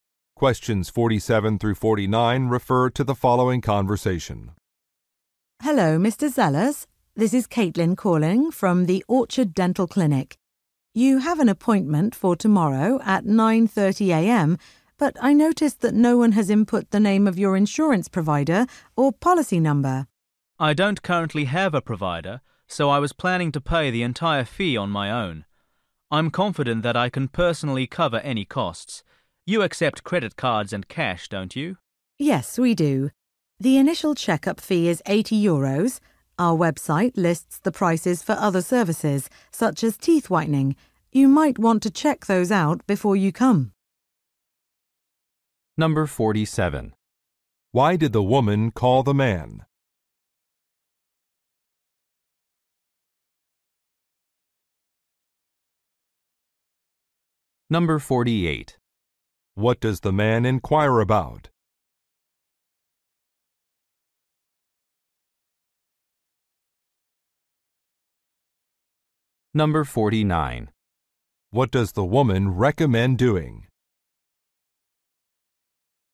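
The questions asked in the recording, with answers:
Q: Why did the woman call the man?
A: His insurance information is missing

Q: What does the man inquire about?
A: Which payment methods are accepted

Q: What does the woman recommend doing?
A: Checking the prices on the website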